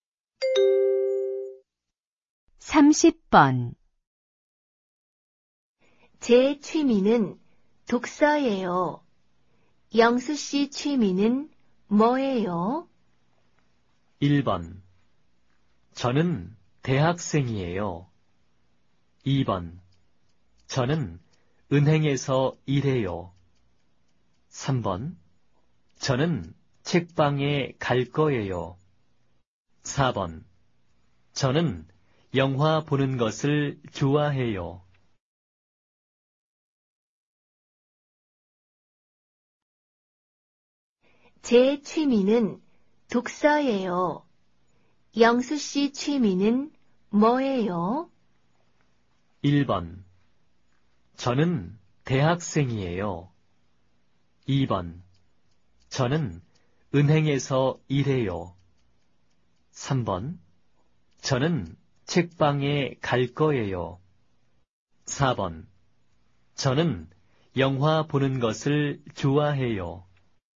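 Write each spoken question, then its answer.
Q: 제 취미는 독서예요. 영수 씨 취미는 뭐예요?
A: 4: 저는 영화 보는 것을 좋아해요.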